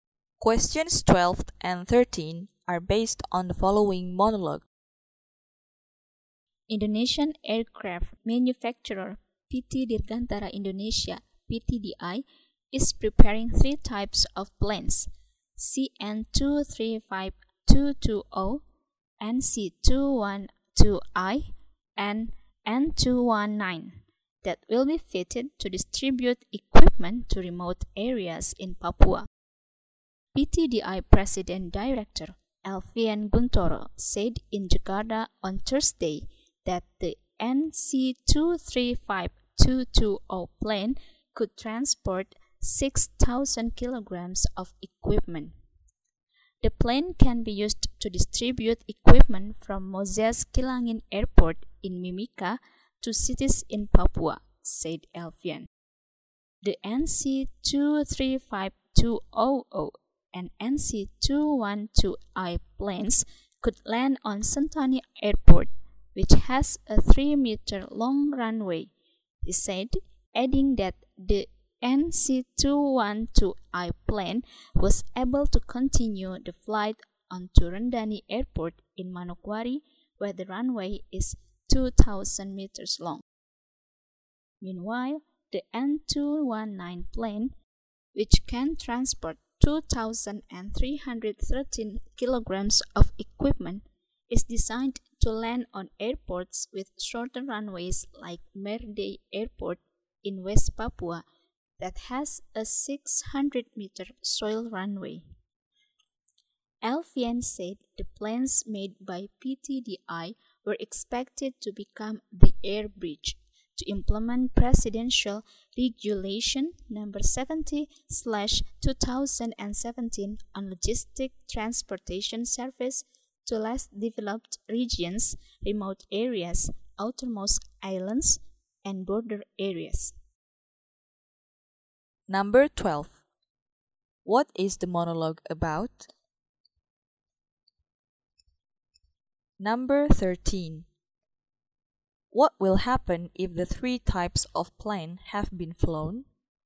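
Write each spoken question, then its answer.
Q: What is the monologue about?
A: PTDI preparing three types of planes to deliver equipment to remote areas in Papua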